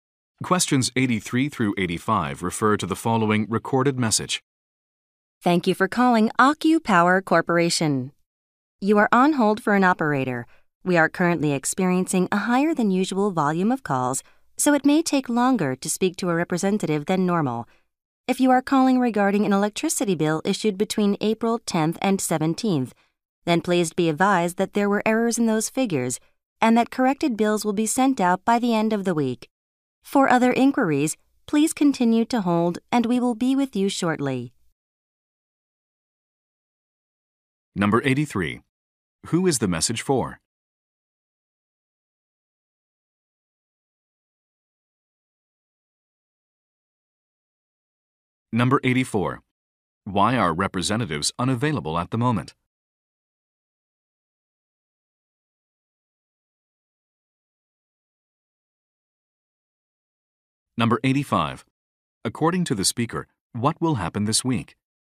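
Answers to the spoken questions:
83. AccuPower customers on hold
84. Higher than usual call volume
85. Corrected bills will be sent out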